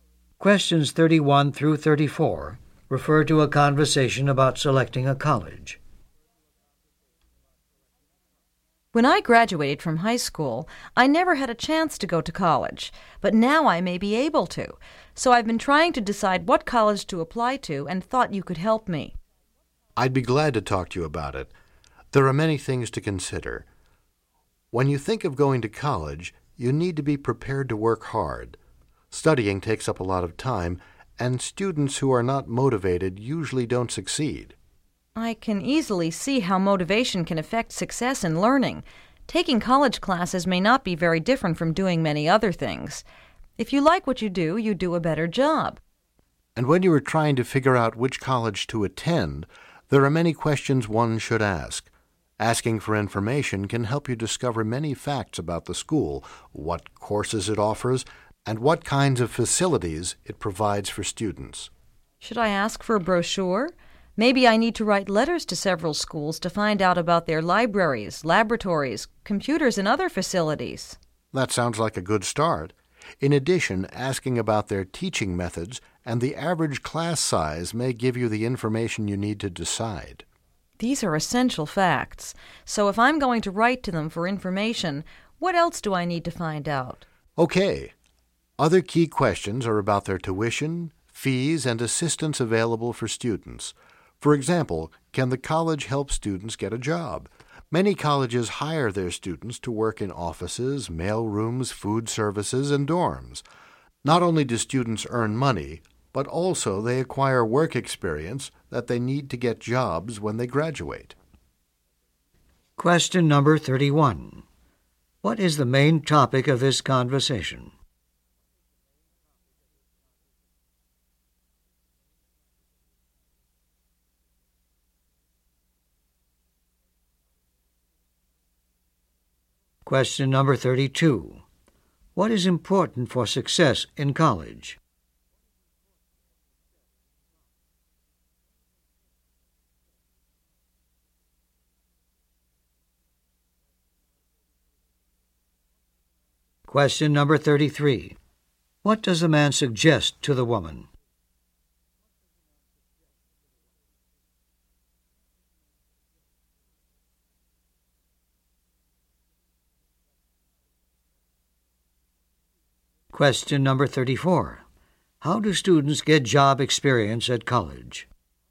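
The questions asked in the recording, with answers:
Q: What is the main topic of this conversation?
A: Selecting a college

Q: What is important for success in college?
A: Motivation and hard work

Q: How do students get job experience at college?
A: By working for the college in offices, mail rooms, food services and dorms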